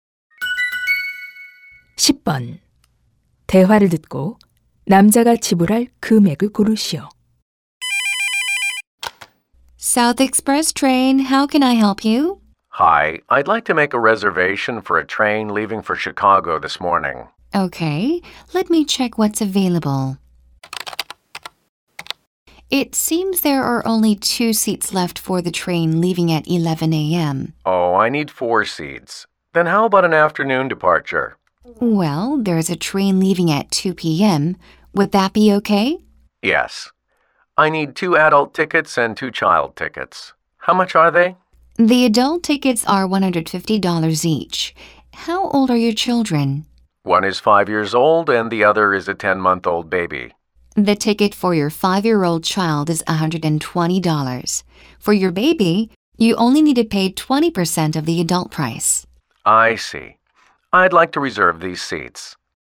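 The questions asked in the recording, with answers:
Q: 대화를 듣고 남자가 지불할 금액을 고르시오.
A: $450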